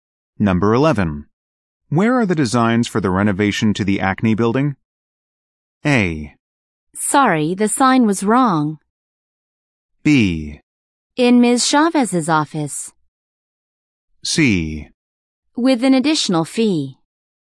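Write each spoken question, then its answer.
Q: Where are the designs for the renovation to the Acne building?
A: B: In Ms. Chavez's office.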